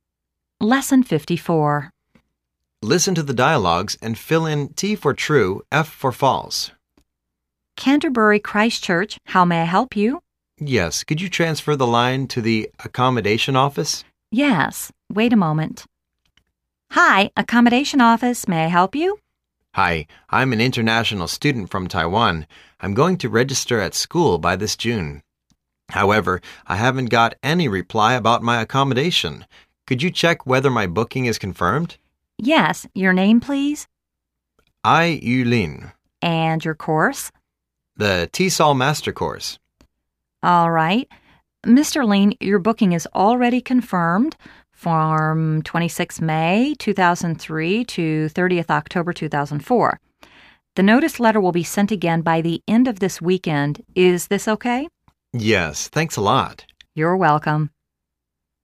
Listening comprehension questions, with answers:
Listen to the dialogues and fill in T for "True",F for "False".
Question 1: She is phoning for the tuition fee.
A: False

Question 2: She is a Taiwanese.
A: True

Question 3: She'II be a postg raduate student at the school.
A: True

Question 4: Her accommodation hasn't confirmed until she pay the accommodation fee.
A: False

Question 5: She'II have her accommodation from May 2003 to Oct. 2004.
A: True